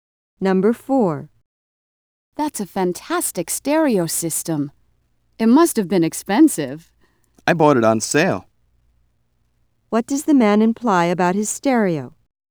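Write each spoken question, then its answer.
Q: What does the man imply about his stereo?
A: It wasn't as expensive as it looks; he got it at a reduced price.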